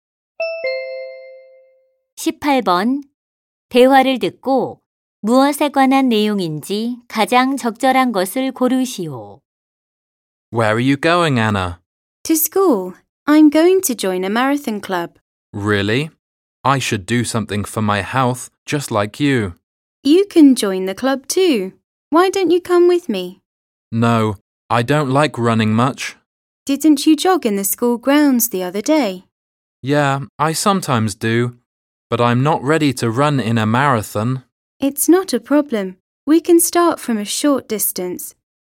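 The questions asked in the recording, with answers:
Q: 대화를 듣고 무엇에 관한 내용인지 가장 적절한 것을 고르시오.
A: 마라톤 동아리 가입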